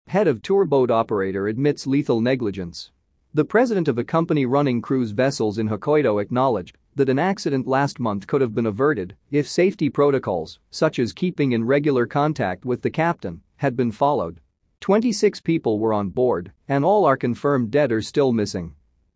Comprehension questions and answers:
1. ( ) in Hokkaido acknowledged that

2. acknowledged that ( ) if safety protocols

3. such as ( ), had been followed.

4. Twenty-six people were on board, ( ).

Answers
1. The president of a company running cruise vessels
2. an accident last month could have been averted
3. keeping in regular contact with the captain
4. and all are confirmed dead or still missing

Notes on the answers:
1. 子音+母音のリンキング 不正解事例)The president o(f) the company running cruise vessels 子音の脱落
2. 子音+母音のリンキング 不正解事例)the accident last month could have been averted 母音+母音のリンキング
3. 子音+母音のリンキング 不正解事例)keeping regular contact with the captain 飲み込む子音
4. 母音 不正解事例)and all were confirmed dead or still missing 半母音